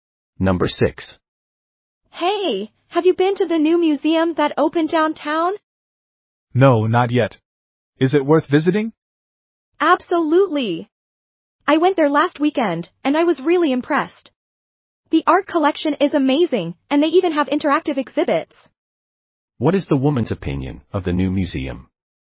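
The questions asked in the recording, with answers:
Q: What is the woman's opinion of the new museum?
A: It is impressive and worth visiting.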